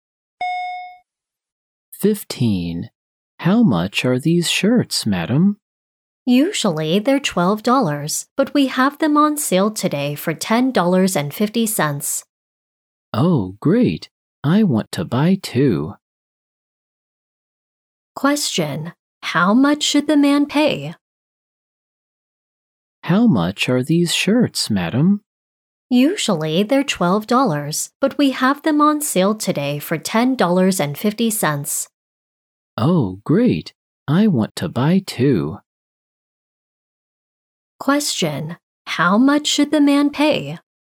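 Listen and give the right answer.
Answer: $21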